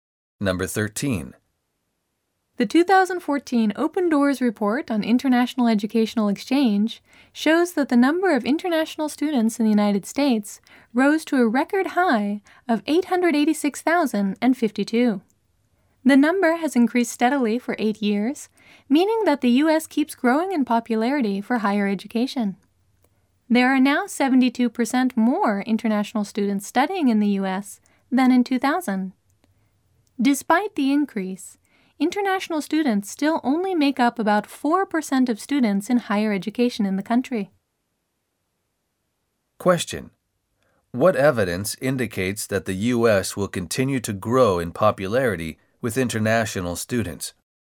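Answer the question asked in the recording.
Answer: The number of international students has increased steadily for 8 years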